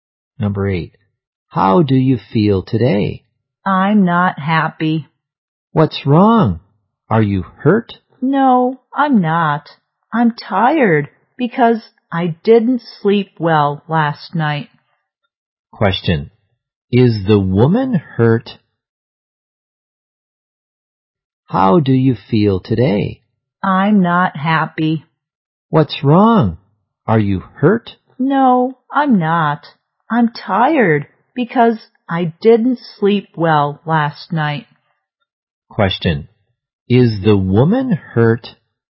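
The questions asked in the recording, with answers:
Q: Question. Is the woman hurt?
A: No, she is tired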